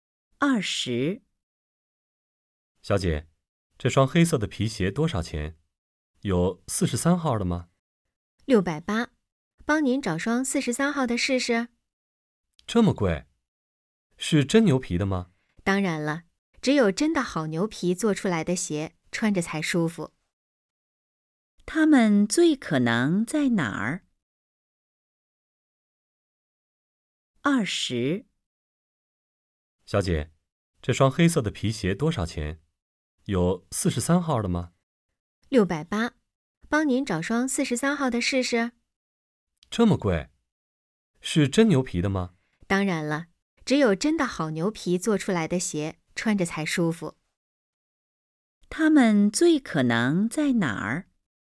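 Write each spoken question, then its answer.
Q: 他们最可能在哪儿?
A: 鞋店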